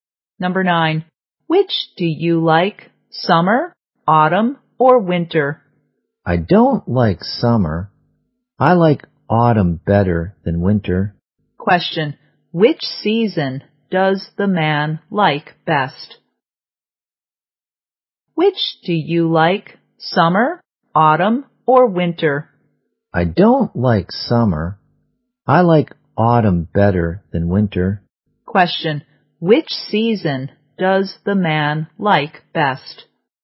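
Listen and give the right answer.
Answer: Autumn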